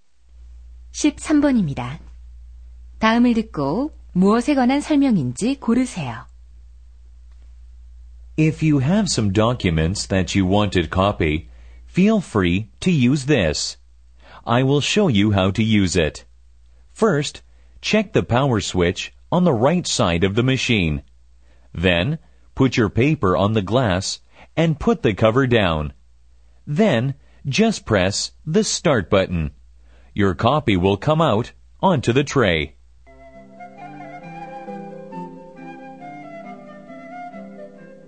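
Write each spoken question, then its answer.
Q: 다음을 듣고 무엇에 관한 설명인지 고르세요.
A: 복사기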